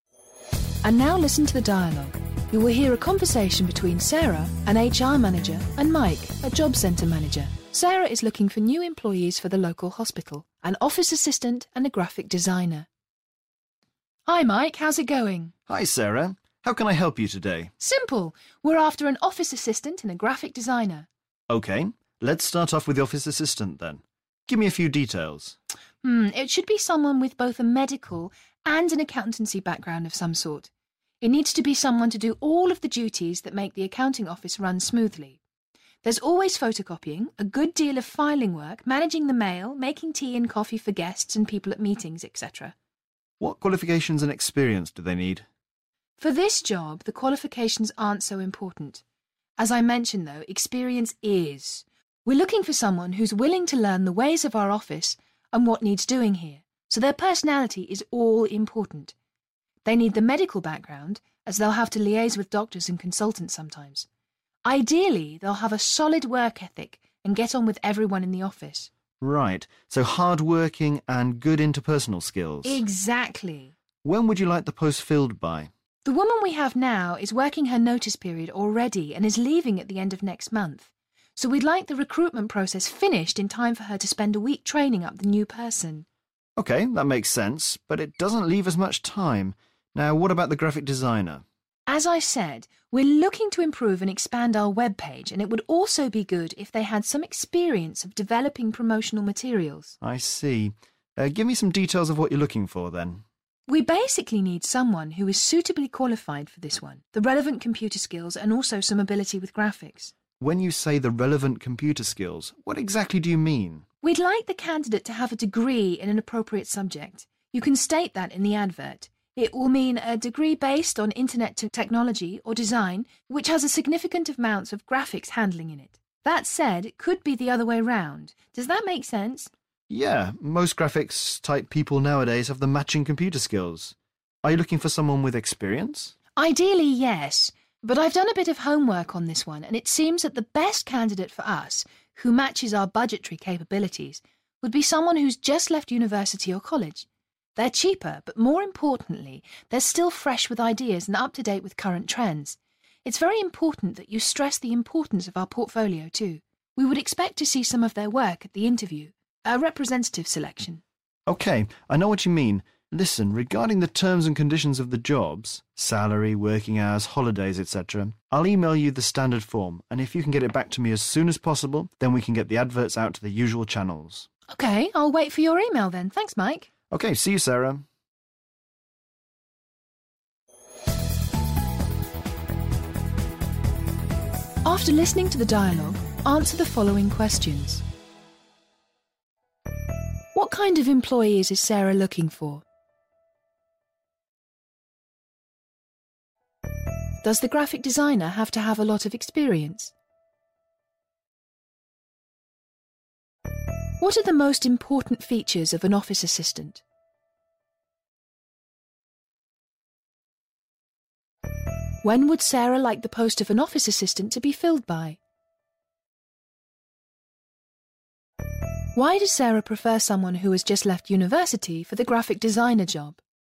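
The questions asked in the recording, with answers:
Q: What kind of employees is Sarah looking for?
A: An office assistant and a graphic designer

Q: Does the graphic designer have to have a lot of experience?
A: No, ideally someone who has just left university or college

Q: When would Sarah like the post of an office assistant to be filled by?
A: A week before the end of next month, so the current assistant can train the new person

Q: Why does Sarah prefer someone who has just left university for the graphic designer job?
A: They are cheaper, fresh with ideas and up to date with current trends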